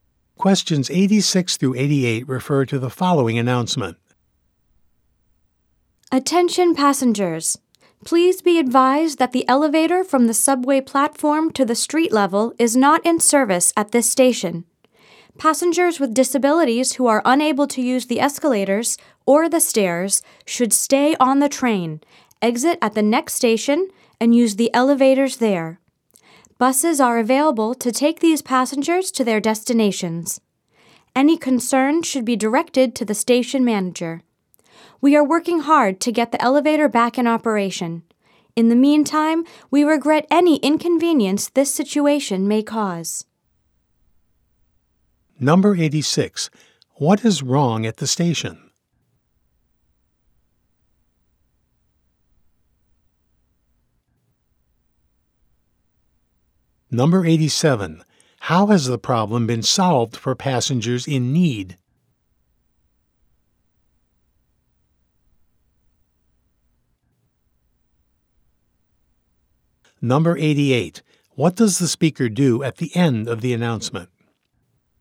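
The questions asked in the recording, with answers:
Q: What is wrong at the station?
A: The elevator is not working

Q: How has the problem been solved for passengers in need?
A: They can use the next station's elevators and take buses

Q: What does the speaker do at the end of the announcement?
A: Apologizes for the inconvenience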